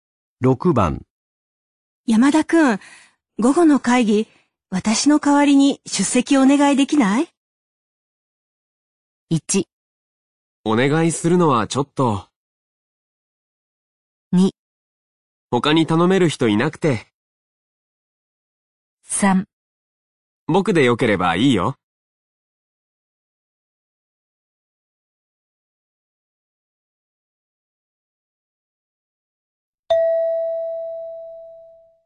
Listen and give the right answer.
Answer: 3

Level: N3 Listening · Test 12